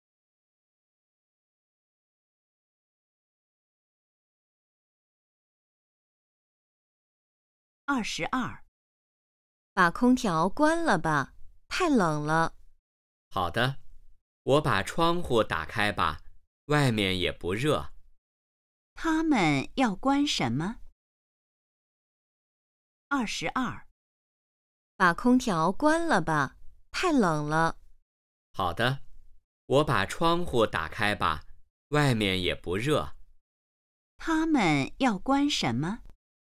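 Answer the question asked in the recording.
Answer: 空调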